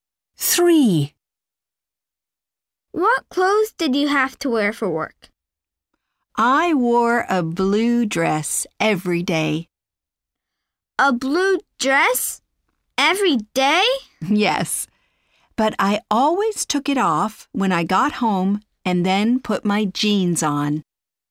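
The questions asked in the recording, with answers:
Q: What clothes did you have to wear for work?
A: a blue dress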